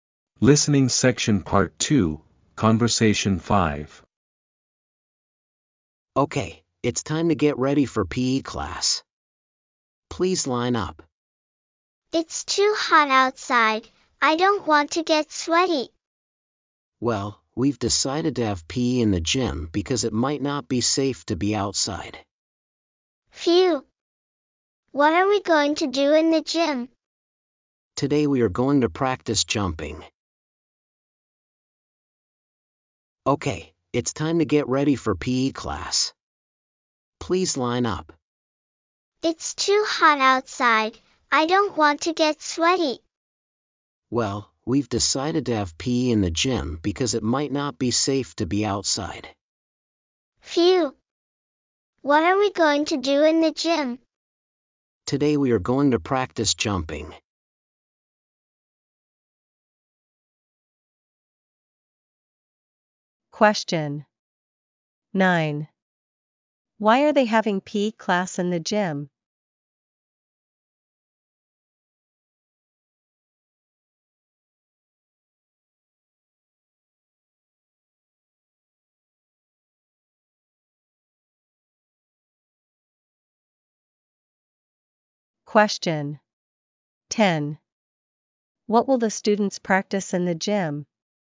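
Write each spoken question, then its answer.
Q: Why are they having PE class in the gym?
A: It's too hot; it might not be safe to be outside

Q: What will the students practice in the gym?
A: Jumping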